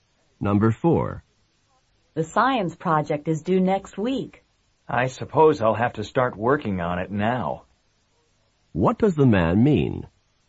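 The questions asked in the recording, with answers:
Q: What does the man mean?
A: He must begin the science project now.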